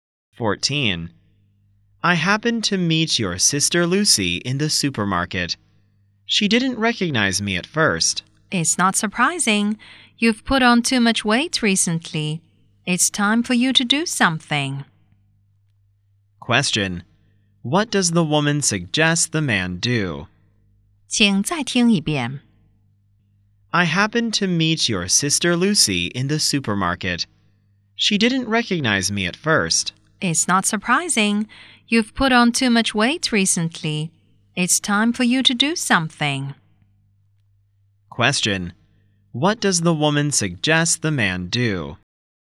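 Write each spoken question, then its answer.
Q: What does the woman suggest the man do?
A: Lose weight / take exercise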